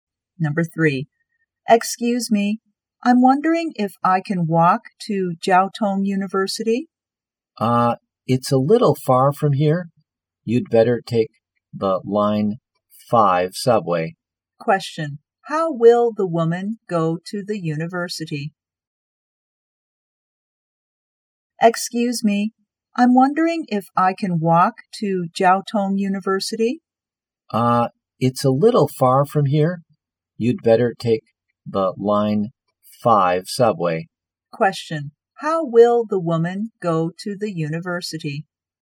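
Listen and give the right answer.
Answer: By subway (Line 5)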